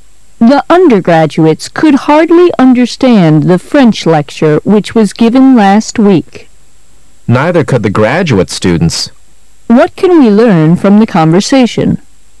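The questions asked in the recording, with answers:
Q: What can we learn from the conversation?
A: Neither the undergraduates nor the graduate students could understand the French lecture well.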